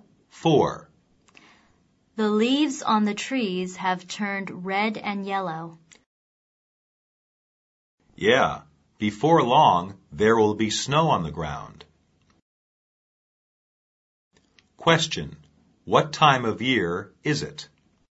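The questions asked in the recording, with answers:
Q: What time of year is it?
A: Autumn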